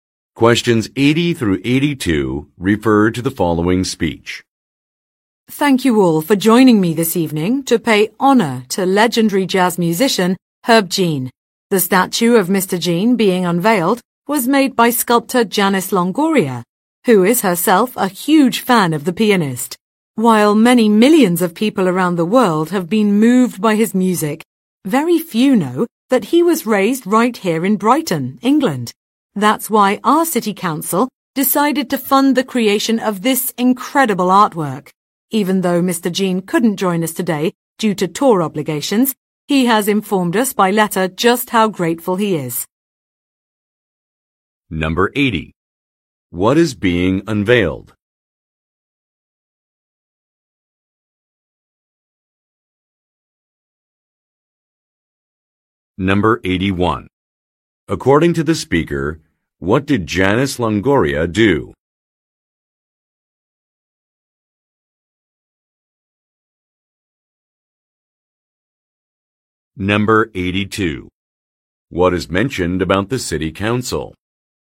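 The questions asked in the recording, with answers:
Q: What is being unveiled?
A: A statue of Herb Jean

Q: According to the speaker, what did Janice Longoria do?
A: She made the statue

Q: What is mentioned about the City Council?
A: It paid for the statue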